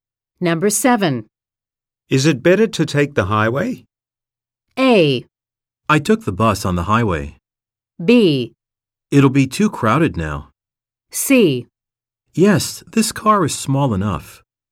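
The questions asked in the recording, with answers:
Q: Is it better to take the highway?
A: B: It'll be too crowded now.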